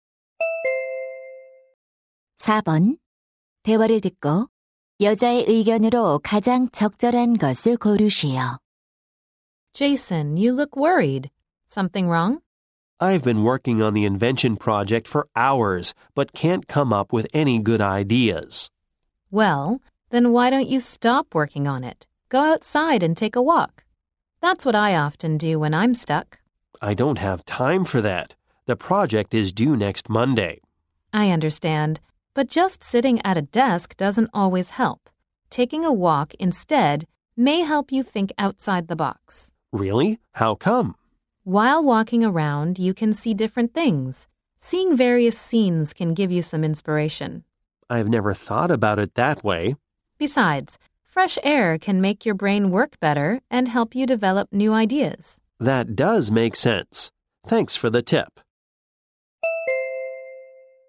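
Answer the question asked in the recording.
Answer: 산책이 새로운 아이디어를 떠올리는 데 도움이 된다.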